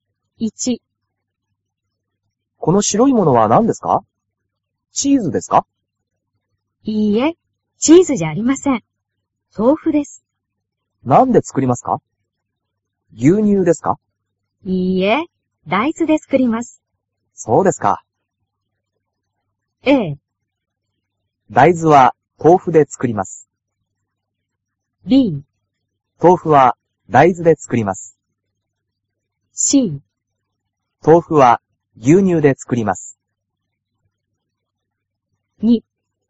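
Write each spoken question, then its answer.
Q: 豆腐は牛乳で作ります。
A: B: 豆腐は大豆で作ります。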